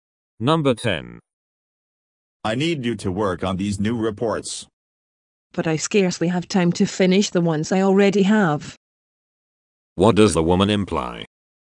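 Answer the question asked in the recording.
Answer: She is too busy to take on more reports.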